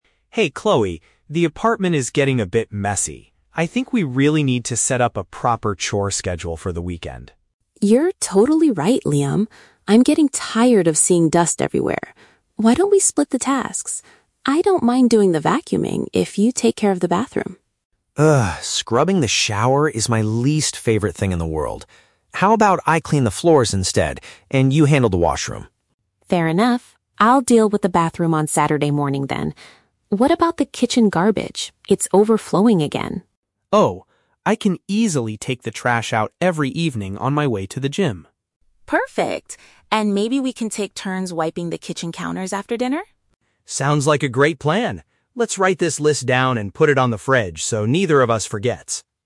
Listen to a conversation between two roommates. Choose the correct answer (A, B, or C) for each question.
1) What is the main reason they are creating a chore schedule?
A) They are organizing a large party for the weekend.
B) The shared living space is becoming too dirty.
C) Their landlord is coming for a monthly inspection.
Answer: The shared living space is becoming too dirty.

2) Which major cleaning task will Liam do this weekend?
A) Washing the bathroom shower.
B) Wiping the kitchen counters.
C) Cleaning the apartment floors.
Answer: Cleaning the apartment floors.

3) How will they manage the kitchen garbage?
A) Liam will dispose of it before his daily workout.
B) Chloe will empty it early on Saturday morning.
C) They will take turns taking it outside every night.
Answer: Liam will dispose of it before his daily workout.

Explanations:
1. Liam says the apartment is "getting a bit messy" and Chloe is tired of seeing "dust everywhere". Option B paraphrases this situation (dirty = messy / dust everywhere). Option A is the Trap: The "weekend" is mentioned, but they are not having a party; they are just cleaning. Option C is not mentioned in the audio.
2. Liam says, "How about I clean the floors instead", which is his way of taking over the vacuuming. Option C is the correct match. Option A is the Trap: Chloe initially asks Liam to take care of the bathroom, but he refuses because it is his "least favorite thing in the world". Option B is also a Trap: They agree to "take turns" (chia nhau làm) wiping the kitchen counters, so it is not just Liam's task.
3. Liam says he will take the trash out "every evening on my way to the gym". Option A uses synonyms to express this (dispose of it = take the trash out; before his daily workout = on my way to the gym). Option B is the Trap: "Saturday morning" is when Chloe will clean the bathroom, not when the garbage is taken out. Option C is a Trap: They take turns wiping the counters, not taking out the garbage.

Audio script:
Liam: Hey Chloe, the apartment is getting a bit messy. I think we really need to set up a proper chore schedule for the weekend.
Chloe: You're totally right, Liam. I'm getting tired of seeing dust everywhere. Why don't we split the tasks? I don't mind doing the vacuuming if you take care of the bathroom.
Liam: Ugh, scrubbing the shower is my least favorite thing in the world. How about I clean the floors instead, and you handle the washroom?
Chloe: Fair enough. I'll deal with the bathroom on Saturday morning then. What about the kitchen garbage? It's overflowing again.
Liam: Oh, I can easily take the trash out every evening on my way to the gym.
Chloe: Perfect. And maybe we can take turns wiping the kitchen counters after dinner?
Liam: Sounds like a great plan. Let's write this list down and put it on the fridge so neither of us forgets.

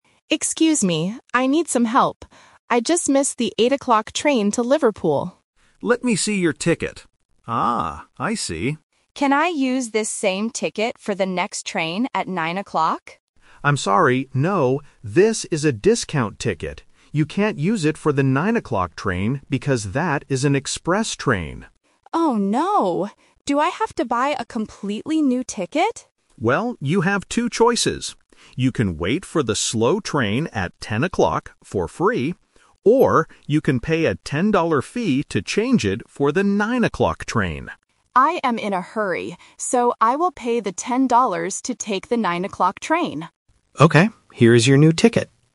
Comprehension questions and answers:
Listen to the conversation between a passenger and a ticket agent. Choose the correct answer (A, B, or C).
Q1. Which train did the passenger miss?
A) The 8:00 train.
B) The 9:00 train.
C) The 10:00 train.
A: The 8:00 train.

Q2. What can the passenger do for free?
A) Take the 9:00 express train.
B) Buy a new discount ticket.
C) Wait for the 10:00 train.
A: Wait for the 10:00 train.

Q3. What does the passenger finally decide to do?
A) Wait for the 10:00 train.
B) Pay a fee to take the 9:00 train.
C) Buy a completely new ticket.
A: Pay a fee to take the 9:00 train.

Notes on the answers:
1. The passenger clearly states at the beginning, "I just missed the 8:00 train to Liverpool." Options (B) and (C) are the times for the next trains (The Traps), not the one he missed.
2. The agent tells the passenger: "You can wait for the slow train at 10:00 for free." Option (A) is The Trap because taking the 9:00 train costs a 10-dollar fee, it is not free. Option (B) is not mentioned.
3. This question tests "The Twist". The passenger has two choices. He could wait for the 10:00 train (Option A - The Trap), but because he is in a hurry, he says: "I will pay the 10 dollars to take the 9:00 train." Option (C) is a trap because the agent tells him he doesn't have to buy a "completely new ticket," just pay a fee.

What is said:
Passenger: Excuse me. I need some help. I just missed the 8:00 train to Liverpool.
Agent: Let me see your ticket. Ah, I see.
Passenger: Can I use this same ticket for the next train at 9:00?
Agent: I'm sorry, no. This is a discount ticket. You can't use it for the 9:00 train because that is an express train.
Passenger: Oh no. Do I have to buy a completely new ticket?
Agent: Well, you have two choices. You can wait for the slow train at 10:00 for free. Or, you can pay a 10-dollar fee to change it for the 9:00 train.
Passenger: I am in a hurry. So, I will pay the 10 dollars to take the 9:00 train.

